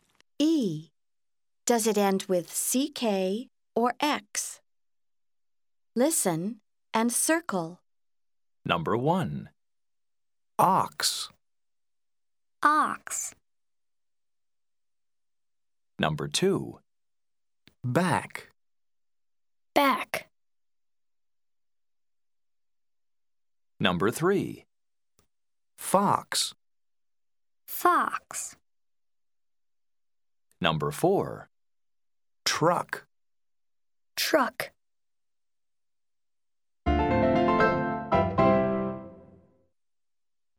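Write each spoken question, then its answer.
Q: Back.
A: CK

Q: Truck.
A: CK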